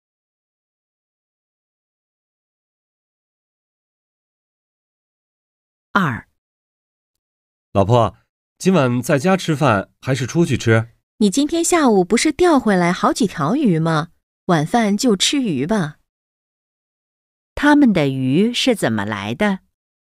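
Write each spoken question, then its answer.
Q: 他们的鱼是怎么来的?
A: 下午钓回来的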